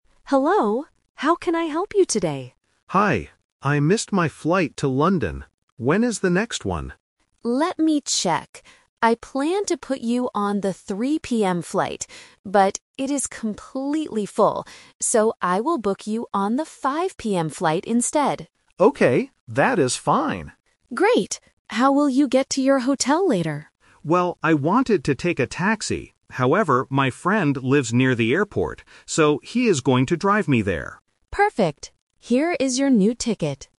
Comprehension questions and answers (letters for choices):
Listen to the conversation between a passenger and a ticket agent. Choose the correct answer (A, B, or C) for each question.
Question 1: What time is the passenger's new flight?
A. 3:00 PM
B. 5:00 PM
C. 8:00 PM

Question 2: Why can't the passenger take the 3:00 PM flight?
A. He has to meet his friend.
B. The ticket is too expensive.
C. The flight is completely full.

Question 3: How will the passenger get to the hotel?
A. By taxi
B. In his friend's car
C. By train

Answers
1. B
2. C
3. B

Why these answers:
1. The agent says she planned to put him on the 3:00 PM flight (The Trap). However, because it is full, she uses "So" to state the final decision: "I will book you on the 5:00 PM flight instead." 8:00 PM is a plausible time but is not mentioned.
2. The agent clearly explains the reason for changing the flight: "But, it is completely full." Option A (meet his friend) is a trap because the friend is mentioned later as someone who will drive him, not the reason he missed the flight. Option B (too expensive) is not mentioned.
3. The passenger says he wanted to take a taxi (The Trap). But he changes his mind because his friend lives nearby. He states his final plan by saying, "So, he is going to drive me there," which means traveling in his friend's car. A train is not mentioned in the audio.

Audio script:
Agent: Hello. How can I help you today?
Passenger: Hi. I missed my flight to London. When is the next one?
Agent: Let me check. I planned to put you on the 3:00 PM flight. But, it is completely full. So, I will book you on the 5:00 PM flight instead.
Passenger: Okay, that is fine.
Agent: Great. How will you get to your hotel later?
Passenger: Well, I wanted to take a taxi. However, my friend lives near the airport. So, he is going to drive me there.